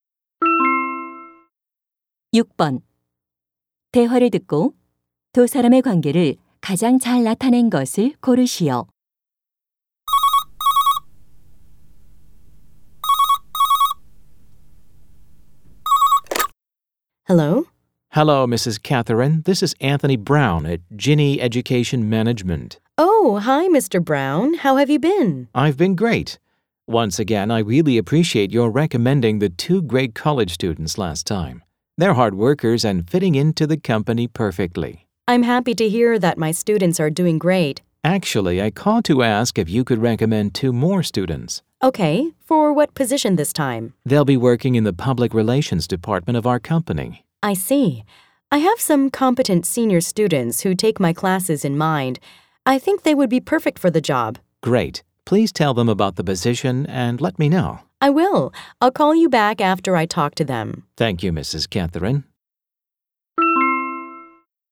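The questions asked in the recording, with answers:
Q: 대화를 듣고 두 사람의 관계를 가장 잘 나타낸 것을 고르시오.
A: 회사 직원 - 대학 교수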